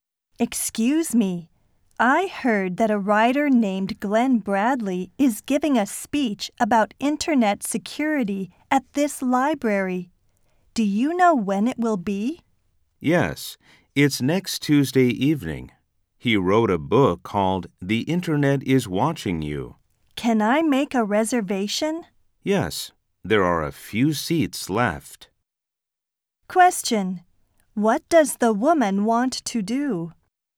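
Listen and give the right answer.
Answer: Reserve a seat for Glenn Bradley's speech on internet security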